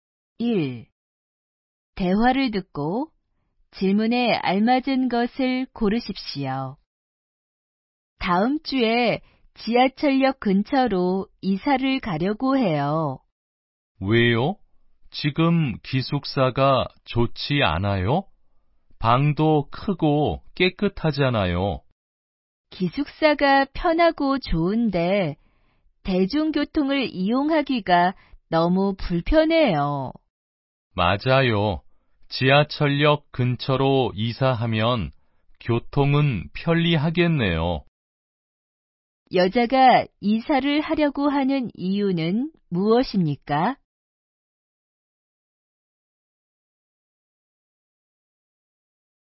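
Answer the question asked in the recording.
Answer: 기숙사에서 대중교통을 이용하기가 너무 불편해서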